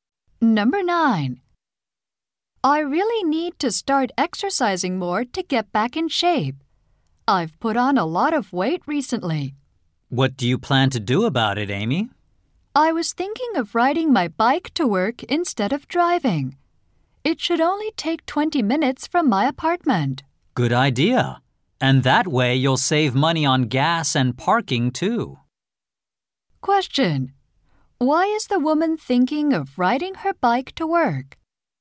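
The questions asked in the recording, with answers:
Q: Why is the woman thinking of riding her bike to work?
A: To exercise and lose weight.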